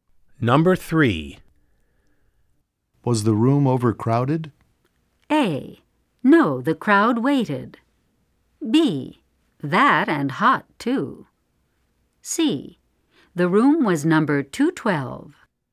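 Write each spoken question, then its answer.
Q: Was the room overcrowded?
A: B: That and hot, too.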